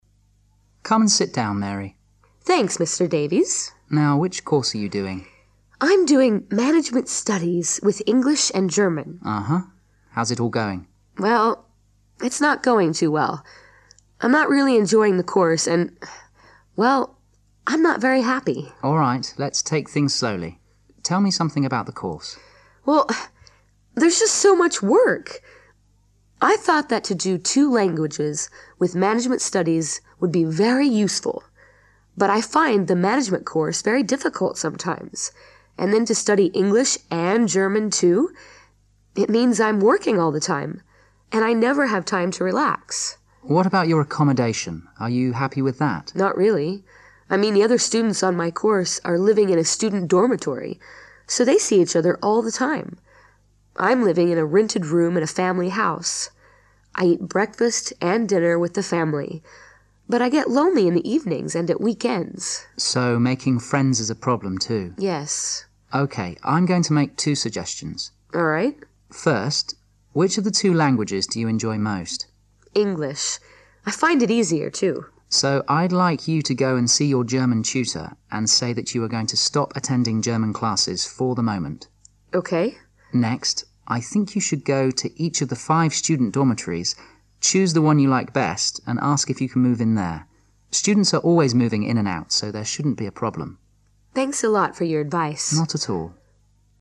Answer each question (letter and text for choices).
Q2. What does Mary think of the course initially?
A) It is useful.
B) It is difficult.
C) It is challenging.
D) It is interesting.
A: A) It is useful.

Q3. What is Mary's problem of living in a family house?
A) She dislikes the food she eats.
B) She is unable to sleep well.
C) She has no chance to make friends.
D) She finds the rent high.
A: C) She has no chance to make friends.

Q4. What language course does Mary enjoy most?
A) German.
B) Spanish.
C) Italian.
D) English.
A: D) English.

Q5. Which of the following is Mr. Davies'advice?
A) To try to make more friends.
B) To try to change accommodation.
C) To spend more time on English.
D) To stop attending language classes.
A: B) To try to change accommodation.

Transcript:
M: Come sit down, Mary.
W: Thanks, Mr. Davies.
M: Now, which course are you doing?
W: I'm doing management studies with English and German.
M: Uh-huh, how's it all going?
W: Well, it's not going too well. I'm not really enjoying the course. And...well, I'm not very happy.
M: All right, let's take things slowly. Tell me something about the course.
W: Well, huh, there's just so much work. I thought that to do two languages with management studies will be very useful. But I find the management course very difficult sometimes. And then to study English and German too. It means I'm working all the time. And I never have time to relax.
M: What about your accommodation? Are you happy with that?
W: Not really. I mean the other students on my course are living in the student dormitory. So they see each other all the time. I'm living in a rented room in a family house. I eat breakfast and dinner with the family. But I get lonely in the evenings and at weekends.
M: So, making friends is a problem too.
W: Yes.
M: OK, I'm going to make two suggestions.
W: All right.
M: First, which of the two languages do you enjoy most?
W: English. I find it easier too.
M: So I'd like you to go and see your German tutor and say that you are going to stop attending German classes for the moment.
M: Next, I think you should go to each of the five student dormitories. Choose the one you like best and ask if you can move in there. Students are always moving in and out so there shouldn't be a problem.
W: Thanks a lot for your advice.
M: Not at all.